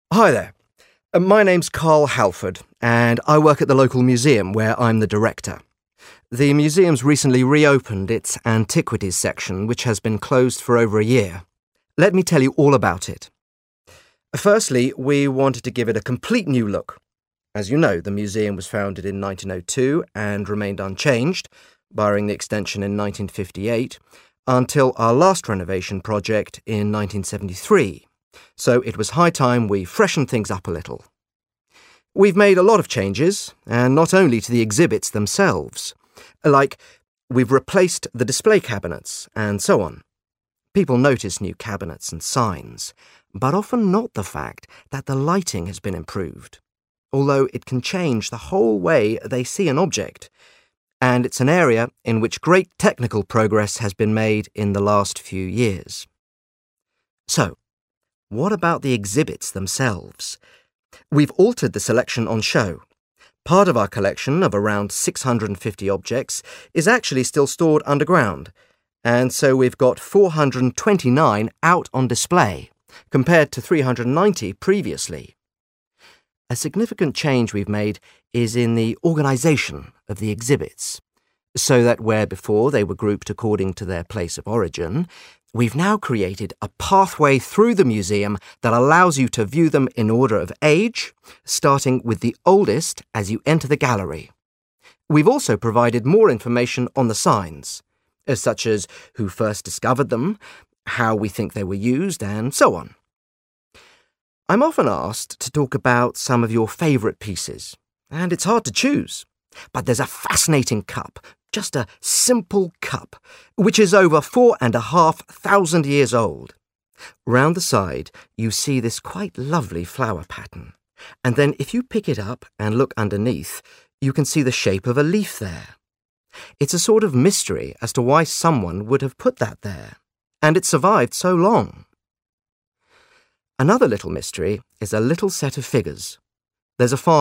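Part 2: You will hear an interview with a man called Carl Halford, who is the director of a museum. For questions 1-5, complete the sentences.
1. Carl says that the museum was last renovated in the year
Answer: 1973

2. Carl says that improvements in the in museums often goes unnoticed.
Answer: lighting

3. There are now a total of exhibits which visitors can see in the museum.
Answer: 429

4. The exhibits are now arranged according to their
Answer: age

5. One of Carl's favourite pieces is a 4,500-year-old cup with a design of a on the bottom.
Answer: leaf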